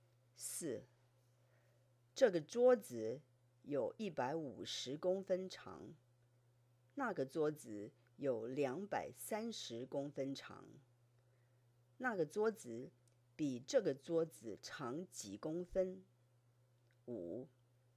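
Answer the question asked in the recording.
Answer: 80公分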